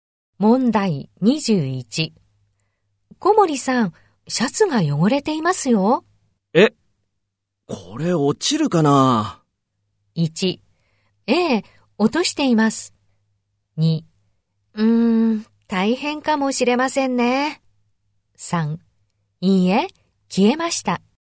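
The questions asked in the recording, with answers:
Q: 小森さん、シャツが汚れていますよ。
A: 2: 大変かもしれませんね。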